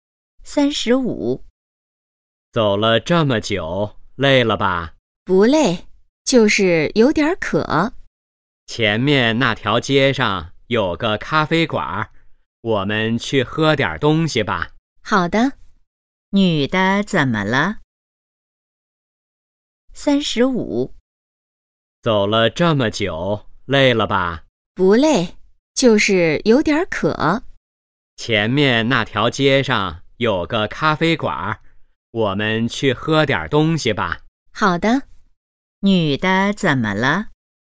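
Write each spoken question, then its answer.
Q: 女的怎么了?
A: 有点渴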